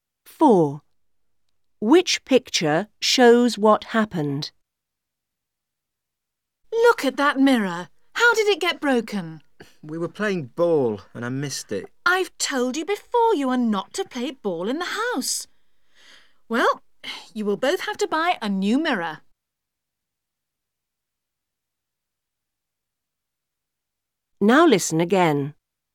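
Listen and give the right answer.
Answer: They broke the mirror playing ball in the house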